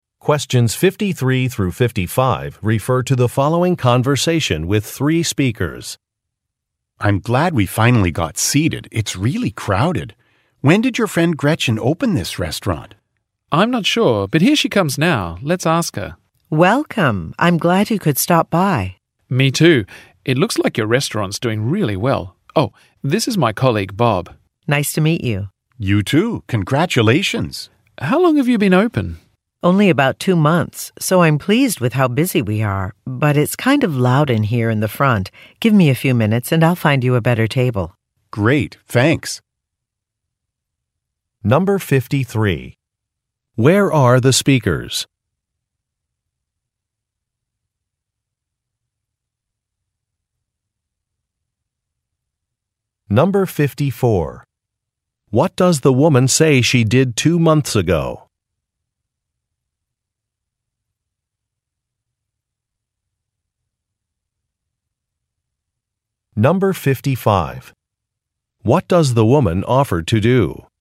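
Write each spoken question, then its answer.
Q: Where are the speakers?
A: At a restaurant

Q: What does the woman say she did 2 months ago?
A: She opened a restaurant

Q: What does the woman offer to do?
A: Find them a better table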